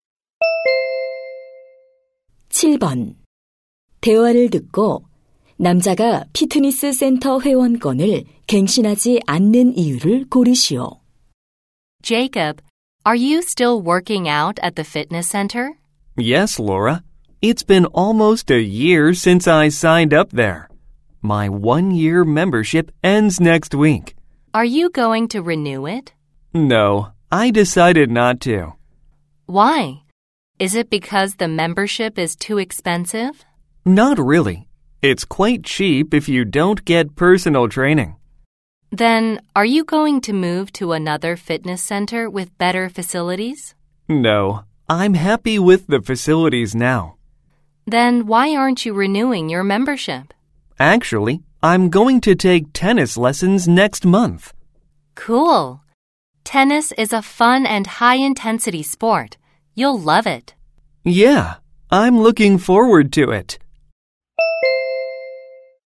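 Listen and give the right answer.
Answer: 다음 달에 테니스 레슨을 받을 예정이라서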